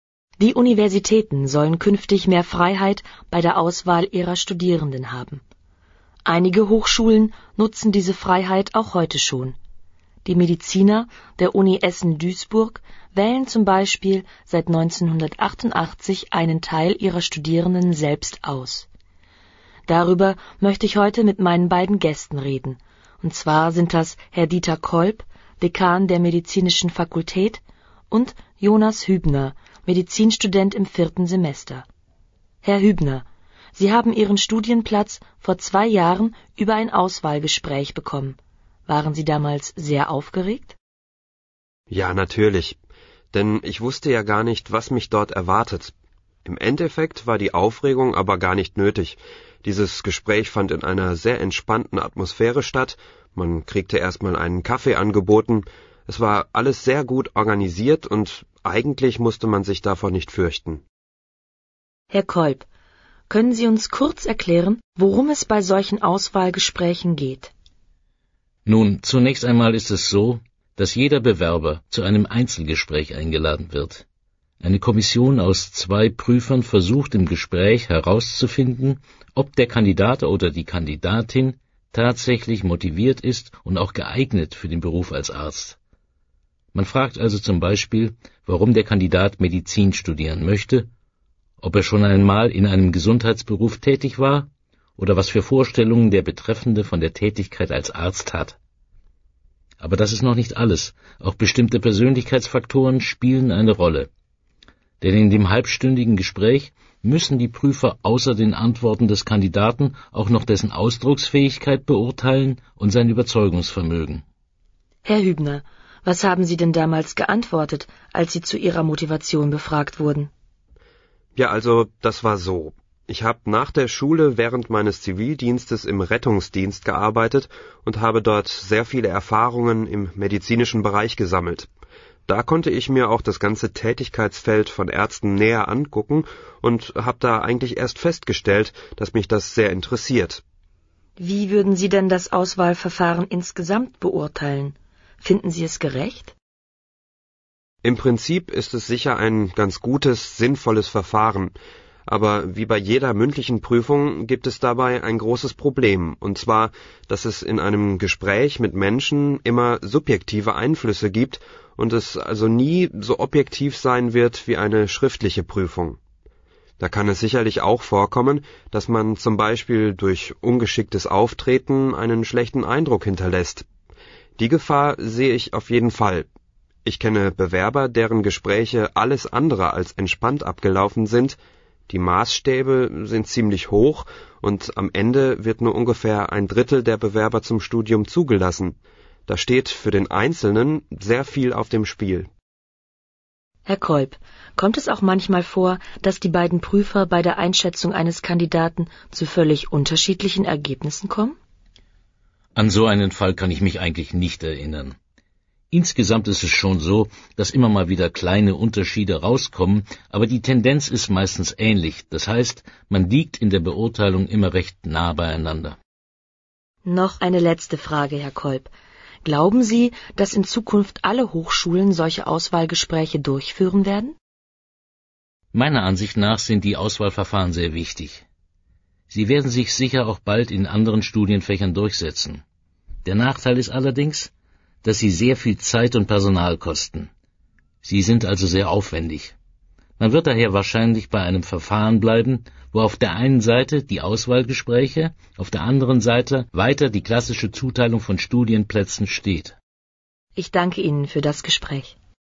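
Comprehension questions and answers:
Entscheiden Sie beim Hören, welche Aussagen richtig oder falsch sind. Markieren Sie die passende Antwort.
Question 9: Jonas Hübner hat sein Medizinstudium vor Kurzem begonnen.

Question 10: Jonas Hübner empfand die Atmosphäre im Auswahlgespräch als angenehm.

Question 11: Herr Kolb berichtet, dass mehrere Kandidaten zusammen in einem Gruppengespräch geprüft werden.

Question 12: Bewerber werden zum Beispiel gefragt, wie sie sich ihr Studium vorstellen.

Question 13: Es wird auch bewertet, wie gut ein Kandidat seine Gedanken formulieren kann.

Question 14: Jonas Hübner interessiert sich schon seit seiner Kindheit für den Arztberuf.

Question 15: Jonas Hübner findet das Auswahlverfahren insgesamt sehr objektiv.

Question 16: Jonas Hübner findet es schwierig, durch ein Auswahlgespräch einen Studienplatz zu bekommen.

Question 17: Herr Kolb glaubt, dass die Prüfer sich bei der Beurteilung eines Kandidaten meistens einig sind.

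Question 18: Herr Kolb hält den Aufwand zur Durchführung der Auswahlgespräche für relativ gering.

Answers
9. Falsch
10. Richtig
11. Falsch
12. Falsch
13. Richtig
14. Falsch
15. Falsch
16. Richtig
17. Richtig
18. Falsch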